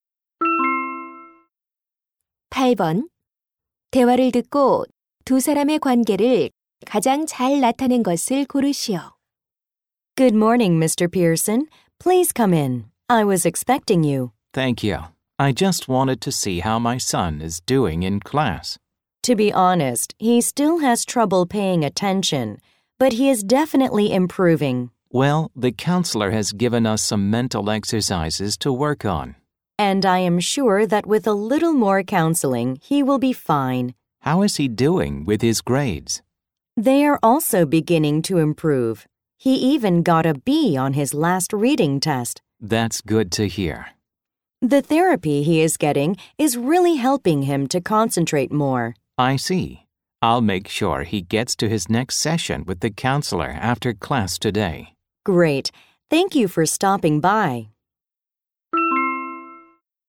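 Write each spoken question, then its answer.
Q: 대화를 듣고 두 사람의 관계를 가장 잘 나타낸 것을 고르시오.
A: 교사 - 학부모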